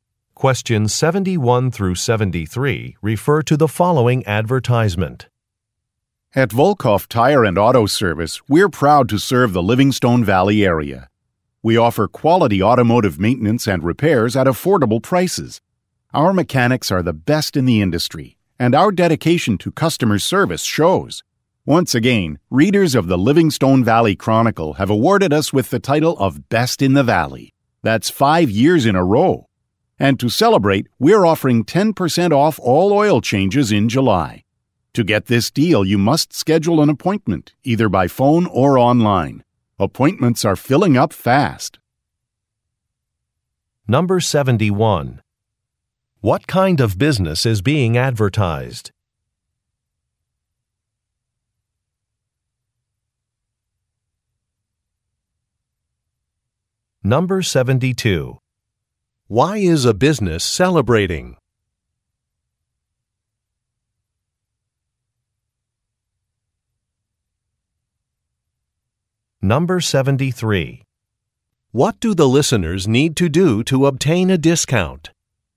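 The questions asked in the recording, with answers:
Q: What kind of business is being advertised?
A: A tire and auto service (car repair shop)

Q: Why is a business celebrating?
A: It won the Best in the Valley award from newspaper readers

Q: What do the listeners need to do to obtain a discount?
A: Schedule an appointment by phone or online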